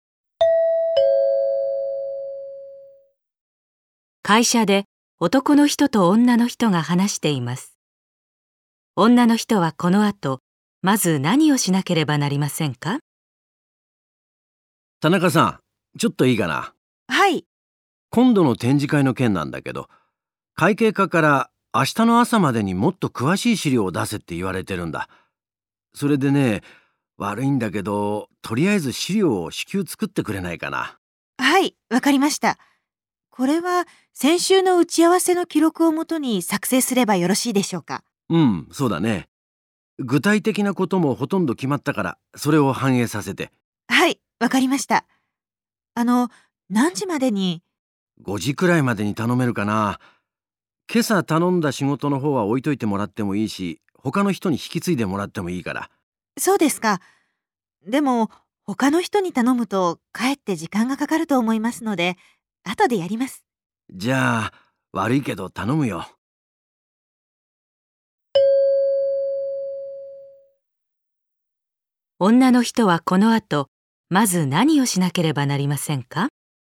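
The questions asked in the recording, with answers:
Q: 女の人はこの後まず何をしなければなりませんか?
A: 打ち合わせの記録をもとに展示会の資料を作る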